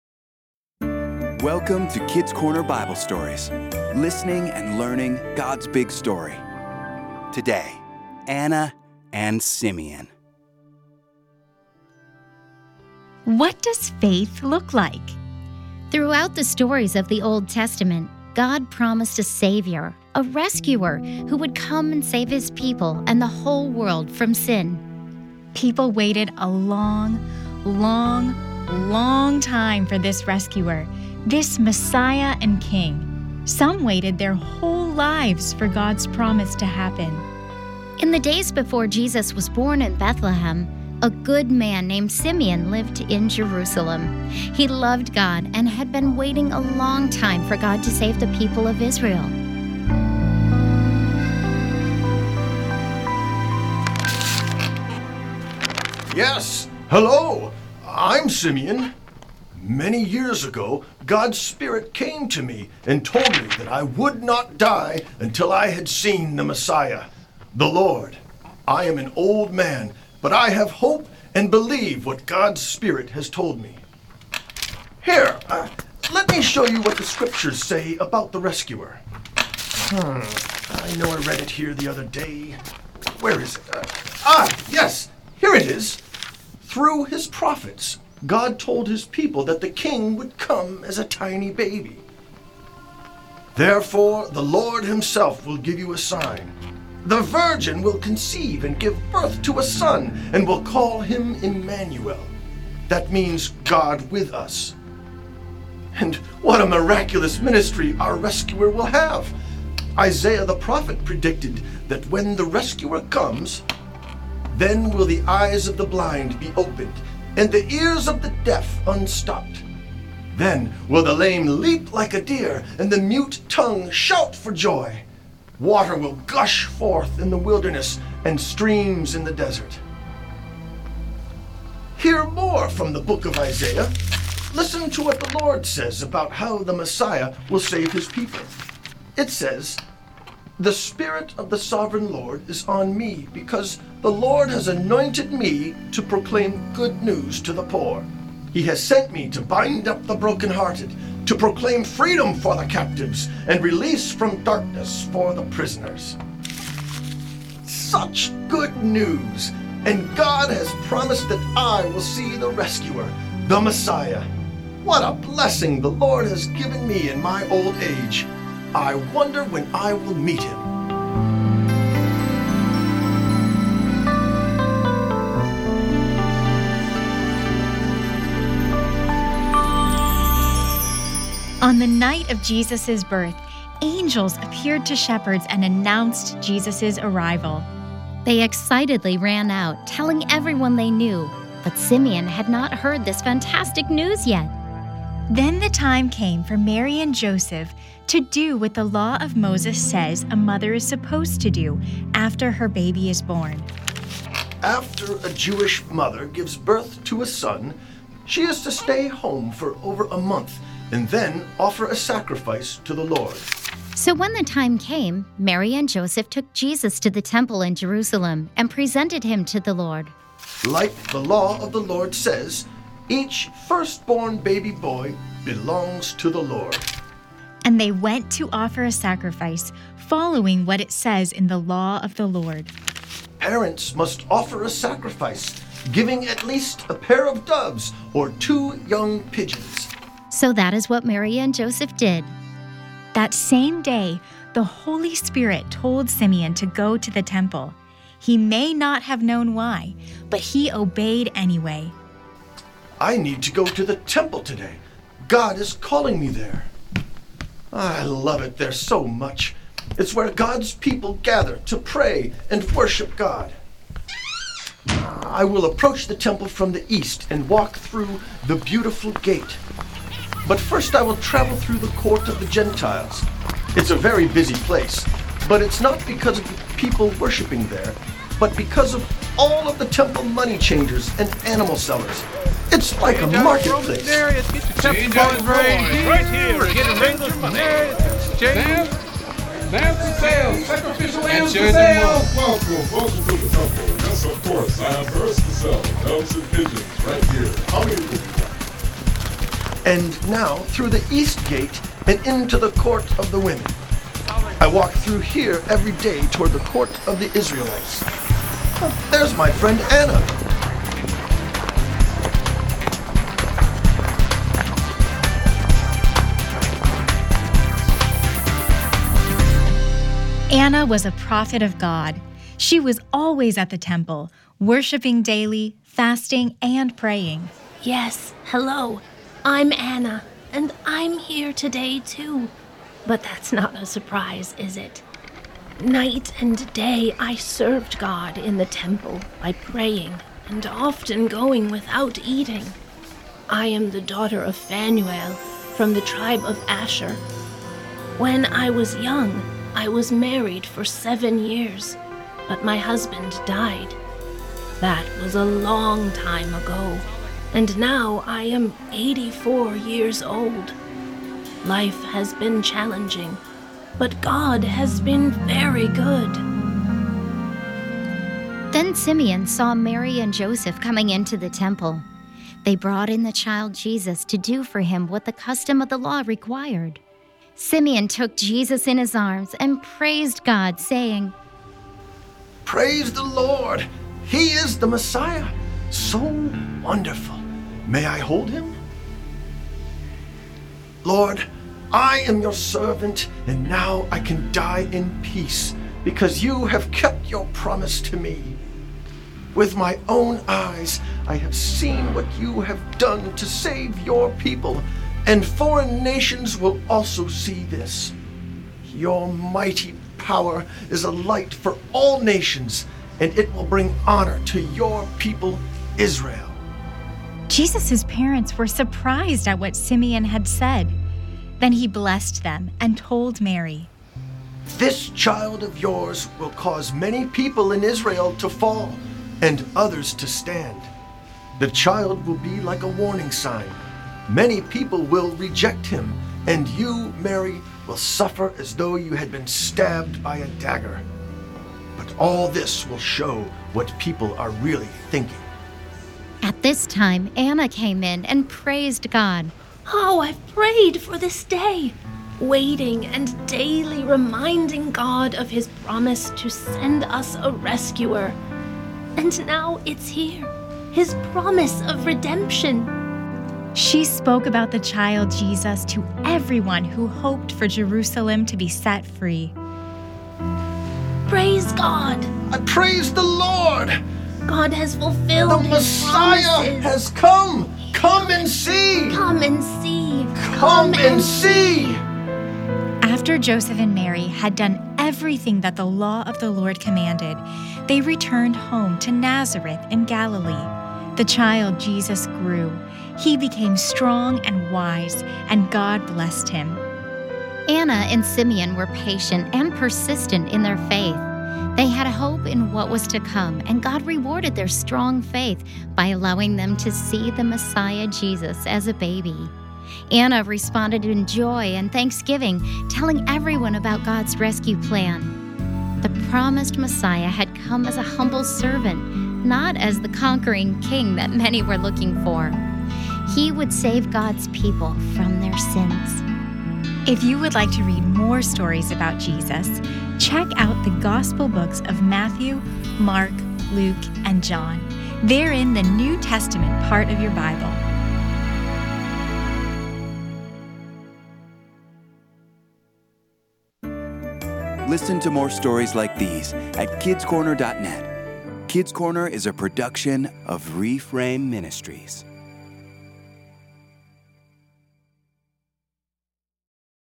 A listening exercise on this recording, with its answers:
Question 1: Why were Mary, Joseph, and Jesus at the Temple in Jerusalem?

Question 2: Who told Simeon to go into the temple?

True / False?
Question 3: Jesus' parents were surprised at what Simeon had said.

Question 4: What are some facts we know about Anna?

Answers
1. They were following the Law of Moses and presenting him to the Lord.
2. God's Spirit.
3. True
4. She was a prophet.